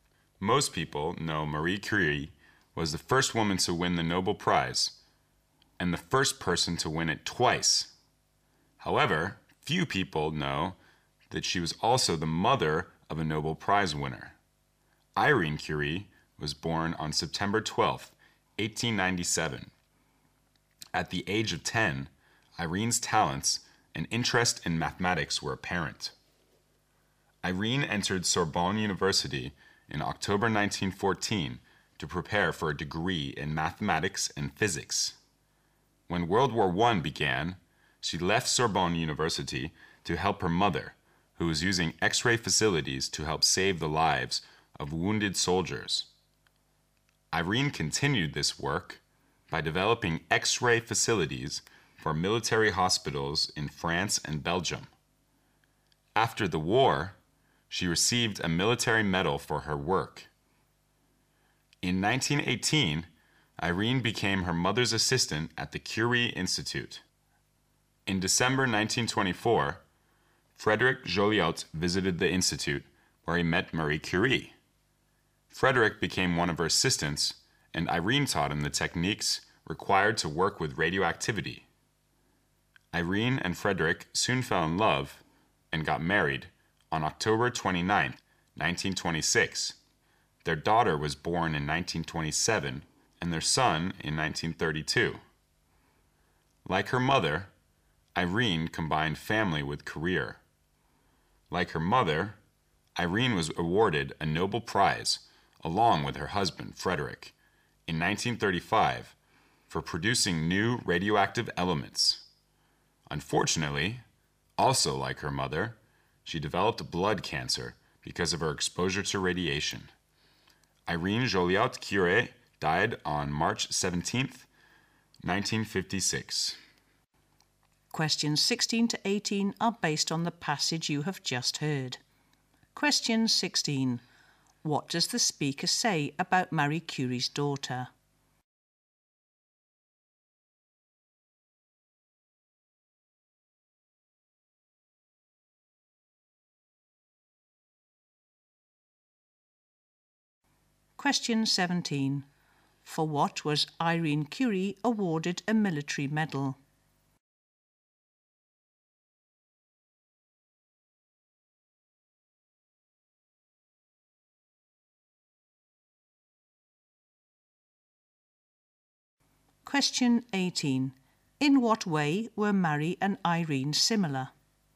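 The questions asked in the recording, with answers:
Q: What does the speaker say about Marie Curie's daughter?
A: She was also a Nobel Prize winner

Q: For what was Irene Curie awarded a military medal?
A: Developing X-ray facilities for military hospitals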